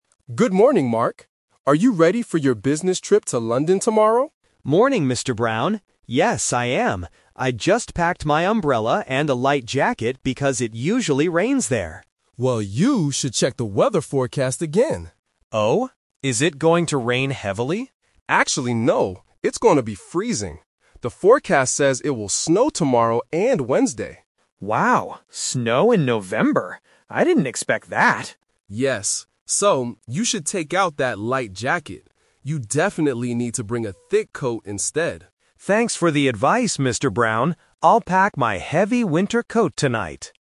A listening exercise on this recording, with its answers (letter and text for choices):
Listen to the conversation and choose the correct answer (A, B, or C).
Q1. What did Mark initially pack for his trip?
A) A thick coat and gloves.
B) An umbrella and a light jacket.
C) Sunglasses and sunscreen.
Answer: B) An umbrella and a light jacket.

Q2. What is the weather forecast for London this week?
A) Freezing and snowy.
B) Rainy and windy.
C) Sunny and warm.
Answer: A) Freezing and snowy.

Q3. What does the boss tell Mark to bring instead?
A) A bigger umbrella.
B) A light jacket.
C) A thick coat.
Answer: C) A thick coat.

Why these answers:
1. Mark says at the beginning, "I just packed my umbrella and a light jacket...". Option (A) is the trap because the thick coat is what he decides to pack at the end of the conversation. Option (C) is never mentioned in the audio.
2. The boss clearly states, "It's going to be freezing. The forecast says it will snow tomorrow and Wednesday." Option (B) is the trap because Mark assumes it will rain ("it usually rains there"), but the boss corrects him ("Actually, no"). Option (C) is not mentioned.
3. Because of the snow, the boss advises, "You definitely need to bring a thick coat instead," and Mark agrees. Option (B) is the trap because the boss explicitly tells him to "take out that light jacket." Option (A) is a plausible item but is not what the boss suggested.

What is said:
Boss: Good morning, Mark. Are you ready for your business trip to London tomorrow?
Employee: Morning, Mr. Brown. Yes, I am. I just packed my umbrella and a light jacket because it usually rains there.
Boss: Well, you should check the weather forecast again.
Employee: Oh? Is it going to rain heavily?
Boss: Actually, no. It's going to be freezing. The forecast says it will snow tomorrow and Wednesday.
Employee: Wow, snow in November? I didn't expect that.
Boss: Yes. So, you should take out that light jacket. You definitely need to bring a thick coat instead.